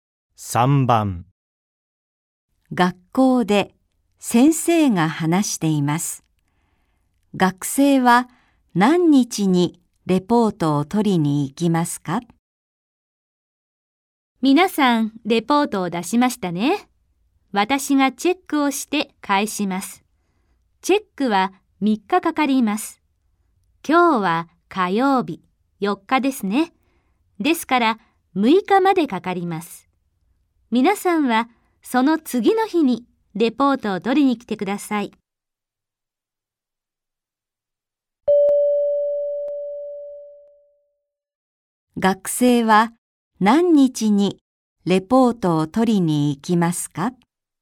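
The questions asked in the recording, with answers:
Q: 学生は何日にレポートを取りに行きますか?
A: 7日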